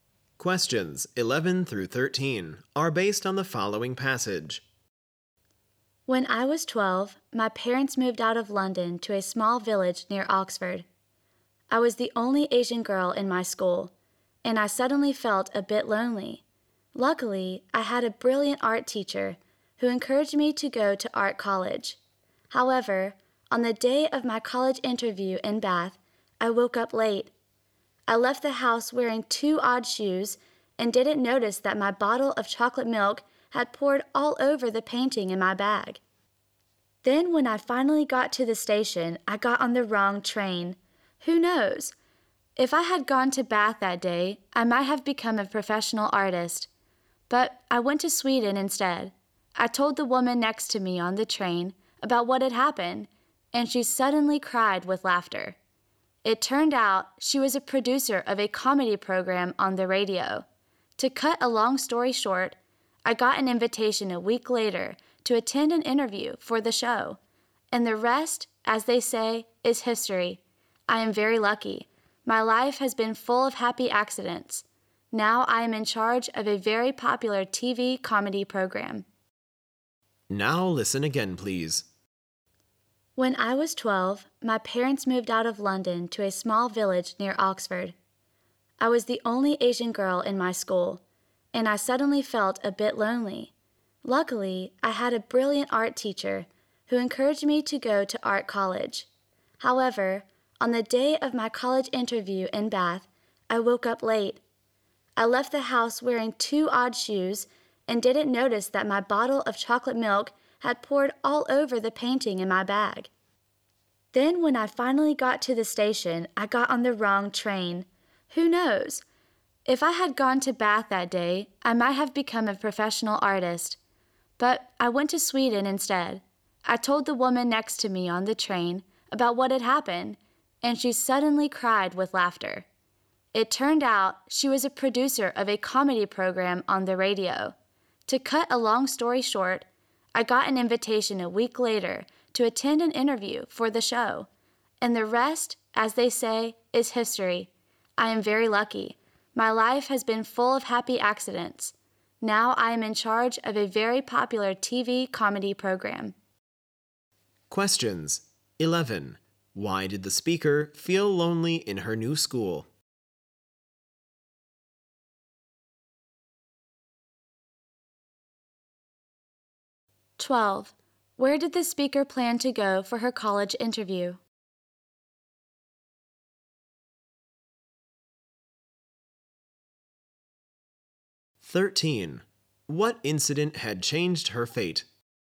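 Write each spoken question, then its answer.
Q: Why did the speaker feel lonely in her new school?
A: She was the only Asian girl there

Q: Where did the speaker plan to go for her college interview?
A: Bath

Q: What incident had changed her fate?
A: Getting on the wrong train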